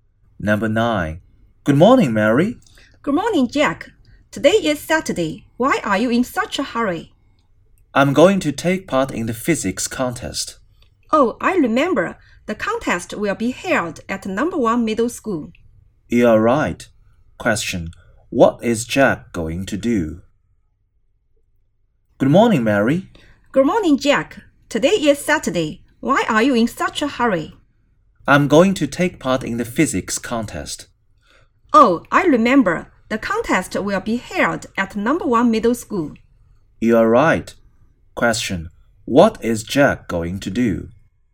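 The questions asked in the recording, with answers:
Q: Question. What is Jack going to do?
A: Take part in the physics contest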